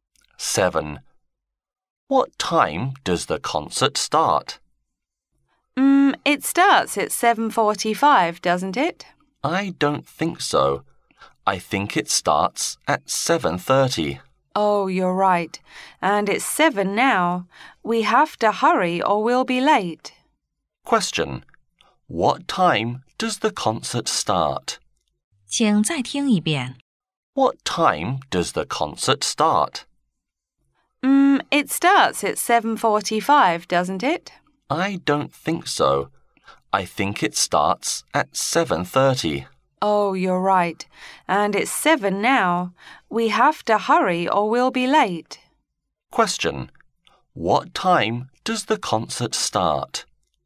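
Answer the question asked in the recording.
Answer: At 7:30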